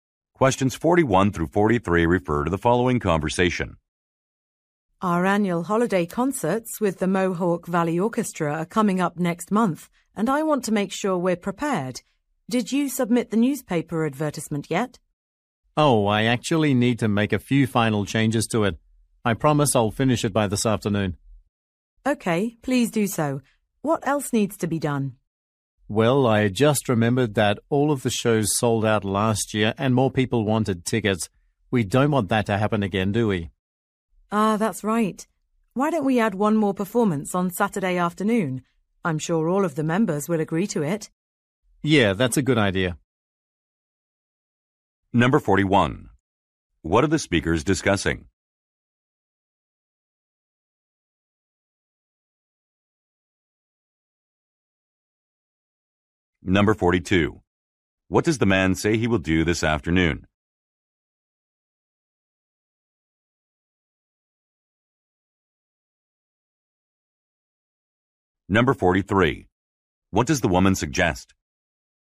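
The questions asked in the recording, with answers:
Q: What are the speakers discussing?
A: Preparing for the annual holiday concerts

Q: What does the man say he will do this afternoon?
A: Finish the newspaper advertisement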